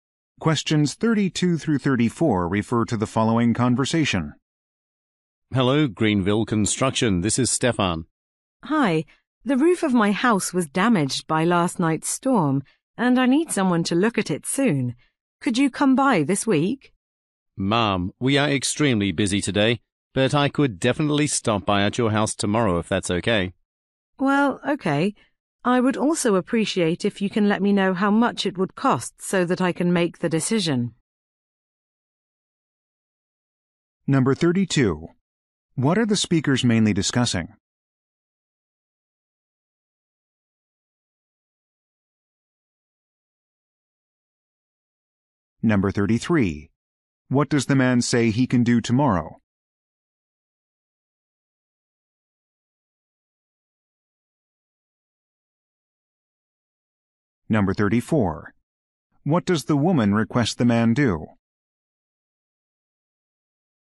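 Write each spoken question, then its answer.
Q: What are the speakers mainly discussing?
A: Repairing a roof damaged by a storm

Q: What does the man say he can do tomorrow?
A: Visit the woman's house

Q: What does the woman request the man do?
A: Give her a cost estimate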